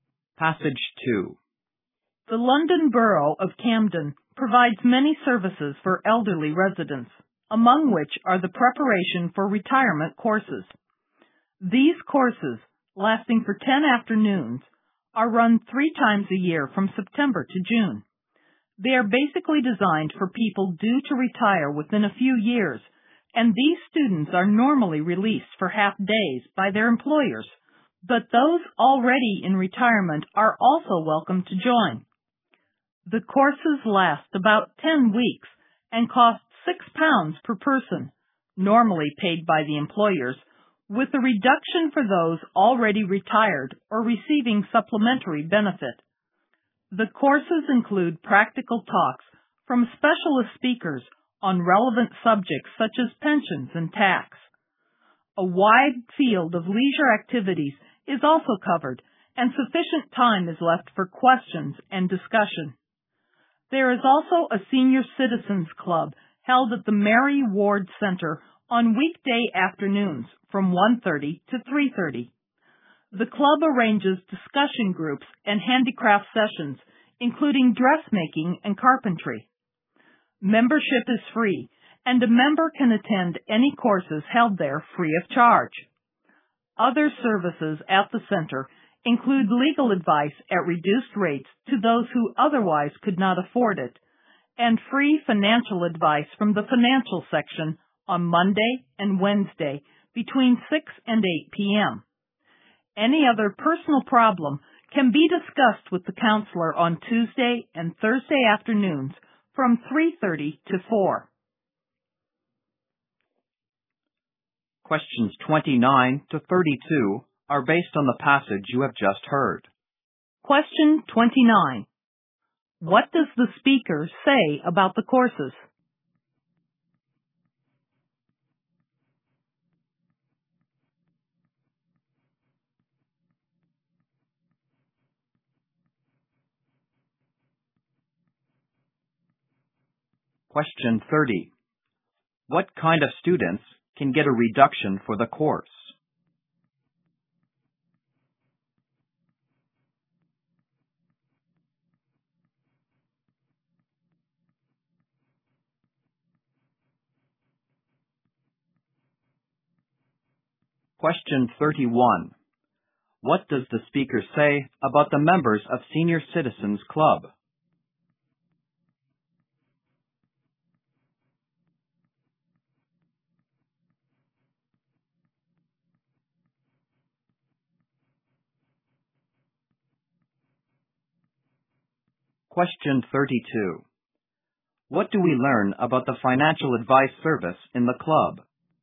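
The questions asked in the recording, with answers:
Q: What kind of students can get a reduction for the course?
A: Those already retired or receiving supplementary benefit.

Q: What does the speaker say about the members of Senior Citizens Club?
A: Membership is free and they can attend any courses there free of charge.

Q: What do we learn about the financial advice service in the club?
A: It is free, on Monday and Wednesday from 6 to 8 p.m.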